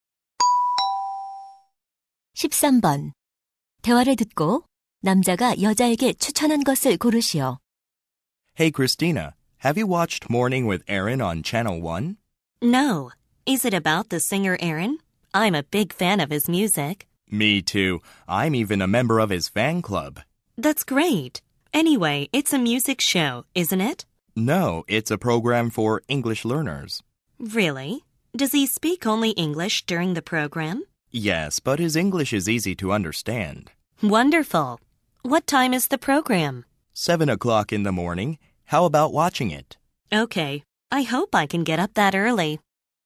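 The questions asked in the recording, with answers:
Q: 대화를 듣고 남자가 여자에게 추천한 것을 고르시오.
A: 영어 학습 프로그램 Morning with Aaron 시청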